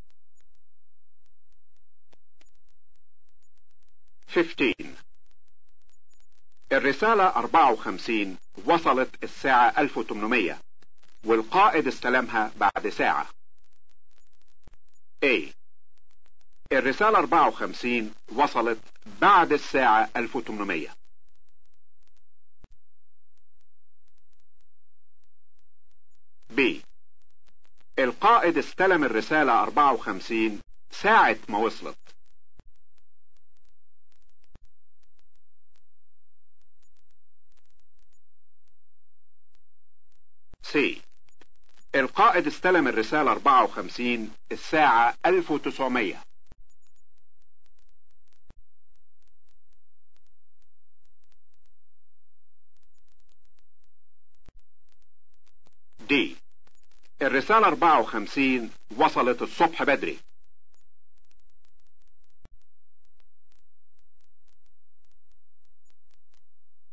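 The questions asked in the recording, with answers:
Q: الرسالة 54 وصلت الساعة 1800 والقائد استلمها بعد ساعة.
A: C: القائد استلم الرسالة 54 الساعة 1900.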